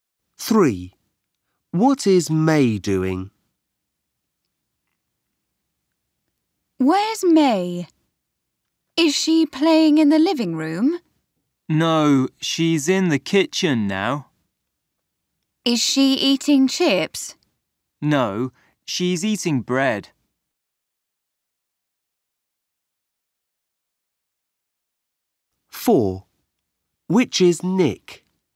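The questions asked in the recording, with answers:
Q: What is May doing?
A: Eating bread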